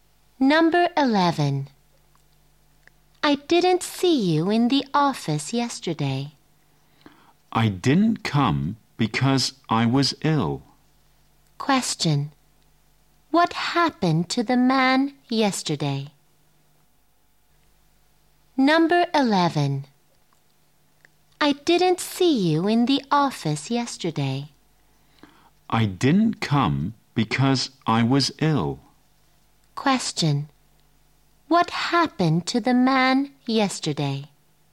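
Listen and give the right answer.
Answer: He was ill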